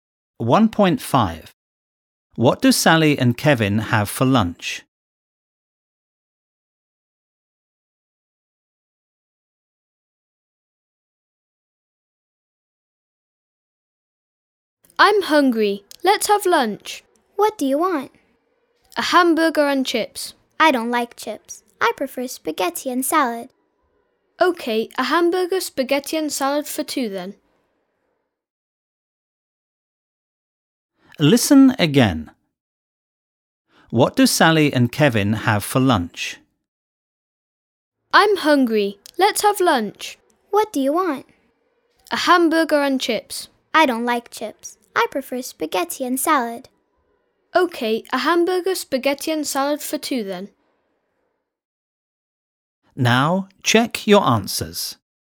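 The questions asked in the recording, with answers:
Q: What do Sally and Kevin have for lunch?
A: A hamburger, spaghetti and salad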